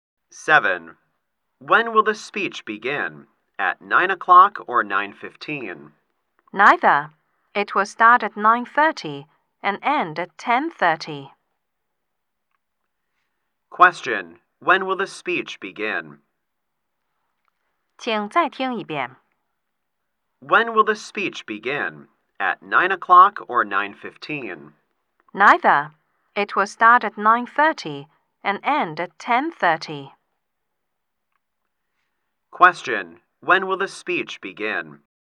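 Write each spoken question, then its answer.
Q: When will the speech begin?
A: At 9:30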